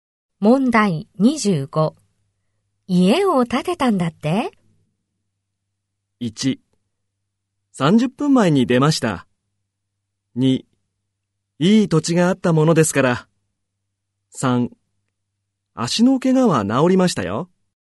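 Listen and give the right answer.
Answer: 2: いい土地があったものですから。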